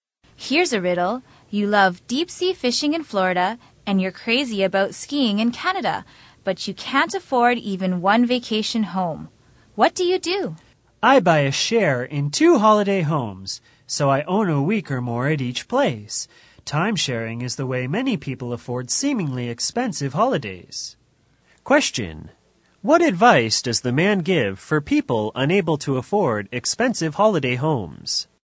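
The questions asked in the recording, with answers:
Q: What advice does the man give for people unable to afford expensive holiday homes?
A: Buy a timeshare in holiday homes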